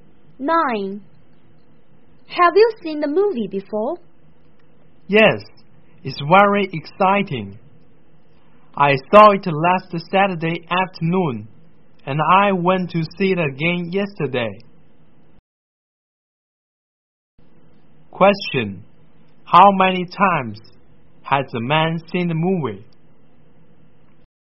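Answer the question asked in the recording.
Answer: Twice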